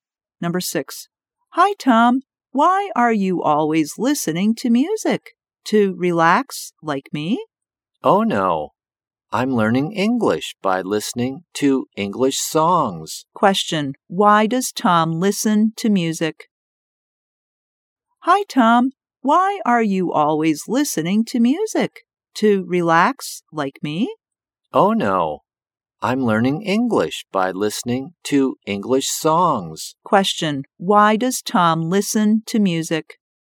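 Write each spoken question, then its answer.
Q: why does Tom listen to music?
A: To learn English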